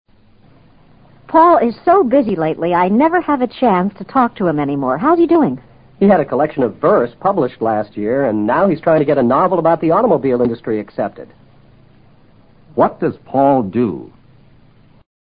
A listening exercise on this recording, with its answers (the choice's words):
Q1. What does Paul do?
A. He publishes books.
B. He is an author.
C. He collects automobiles.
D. he works in industry.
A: He is an author.

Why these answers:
he had a collection of verse (诗集) published 和he's trying to get a novel accepted 提供的信息可以判断他是个作家(author)。A指出版商。C是收藏家。D是从事工业的企业家或工人。均与上述信息不符。automobile industry: 汽车制造业。